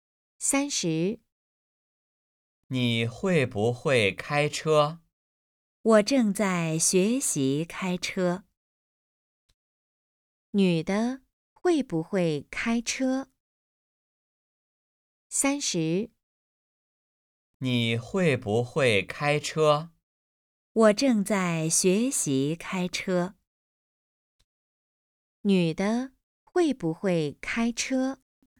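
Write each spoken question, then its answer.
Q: 女的会不会开车?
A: 不会,正在学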